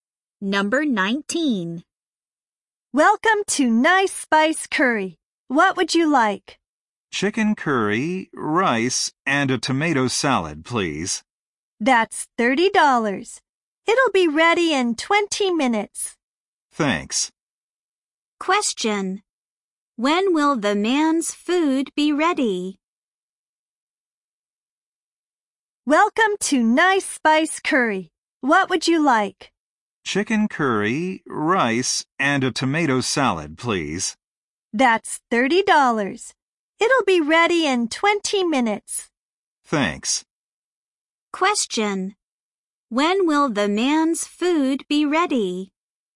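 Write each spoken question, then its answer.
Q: When will the man's food be ready?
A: In 20 minutes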